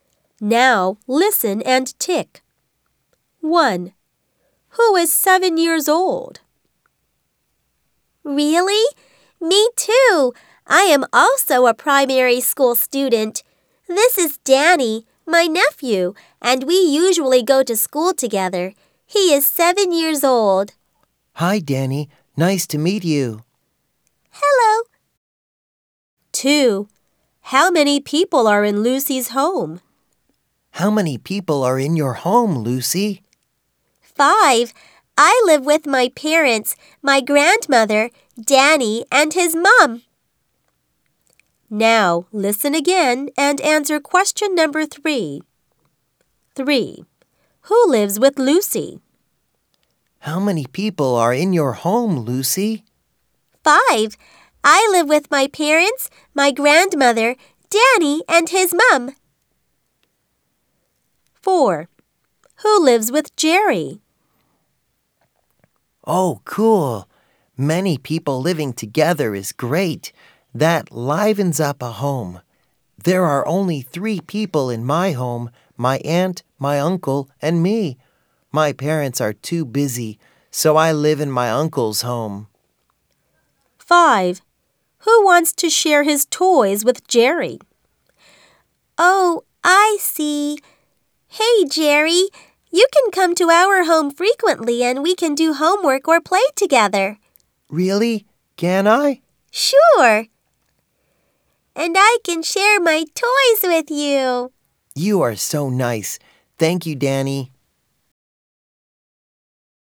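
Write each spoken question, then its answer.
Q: Who is 7 years old?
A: Danny

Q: Who lives with Lucy?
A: Her parents, her grandmother, Danny and his mom

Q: Who lives with Jerry?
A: His aunt and uncle

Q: Who wants to share his toys with Jerry?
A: Danny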